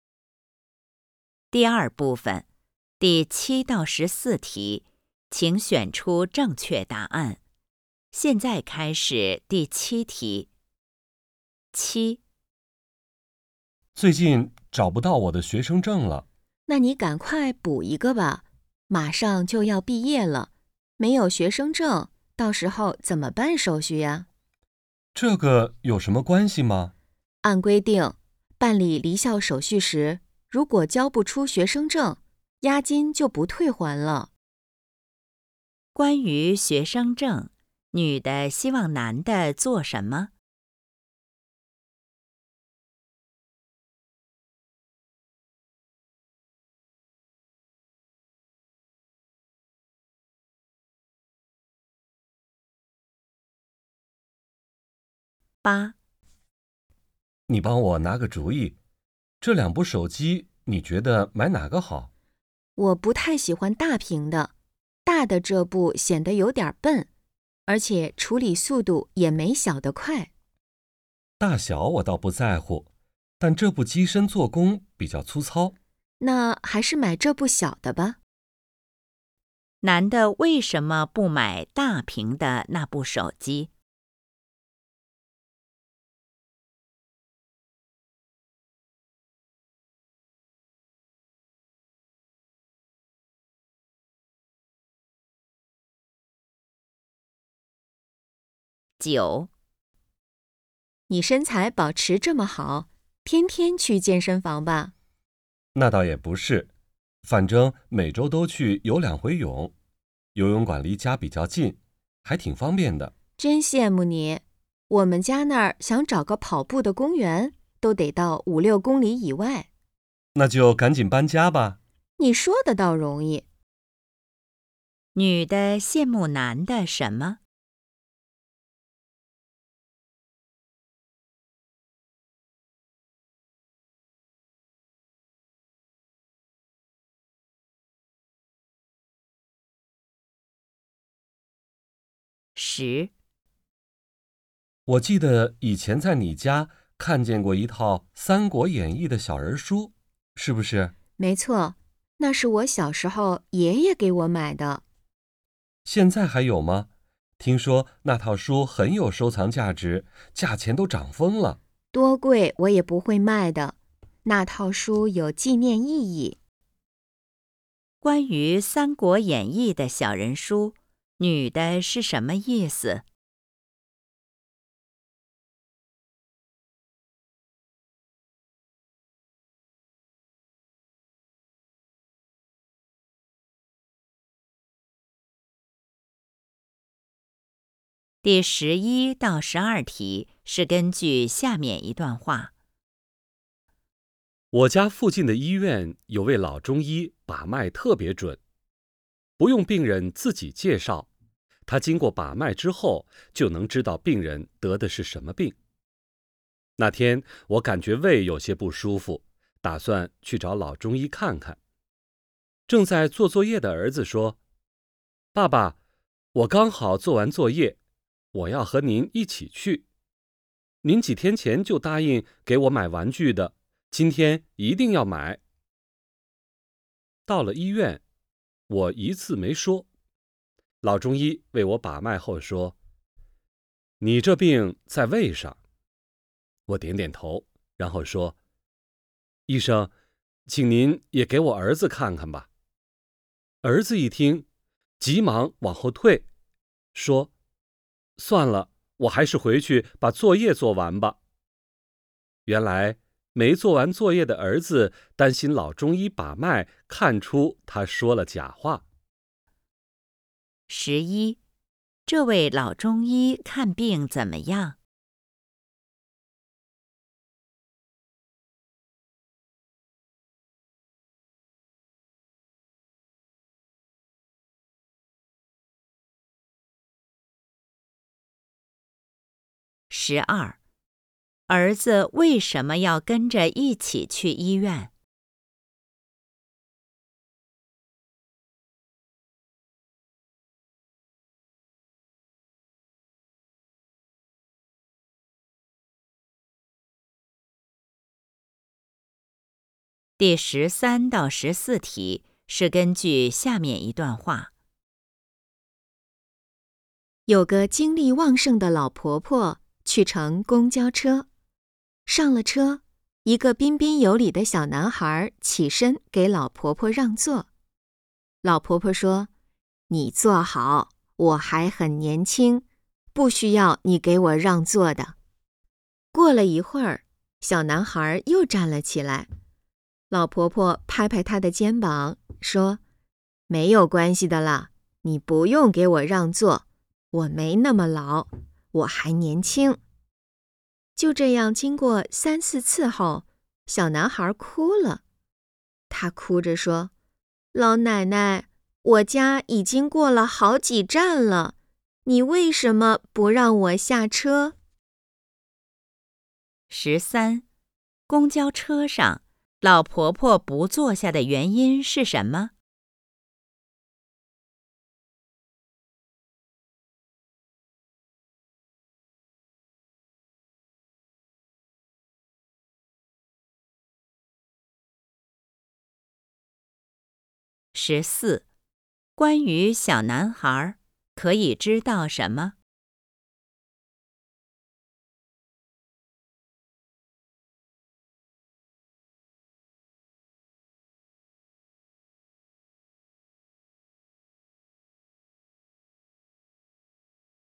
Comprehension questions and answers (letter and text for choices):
第7-14题:请选择出正确答案。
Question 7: 关于学生证,女的希望男的做什么?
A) 早点儿补办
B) 再好好找找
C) 别要押金了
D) 留下做纪念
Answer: A) 早点儿补办

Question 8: 男的为什么不买大屏的那部手机?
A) 显得有点儿笨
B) 价格有点儿贵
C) 牌子不太喜欢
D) 机身做工粗糙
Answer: D) 机身做工粗糙

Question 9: 女的羡慕男的什么?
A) 身材保持得好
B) 游泳馆离家近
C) 每天吃得很少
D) 天天去健身房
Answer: B) 游泳馆离家近

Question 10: 关于《三国演义》的小人书,女的是什么意思?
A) 等着升值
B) 留作纪念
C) 送给爷爷了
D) 想卖给男的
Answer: B) 留作纪念

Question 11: 这位老中医看病怎么样?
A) 把脉不是特别准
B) 判断病情很准确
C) 开的药方很特别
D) 询问病情很仔细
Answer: B) 判断病情很准确

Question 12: 儿子为什么要跟着一起去医院?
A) 觉得胃有些不舒服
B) 想跟老中医学看病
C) 顺便让爸爸买玩具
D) 做完作业后散散心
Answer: C) 顺便让爸爸买玩具

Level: HSK 5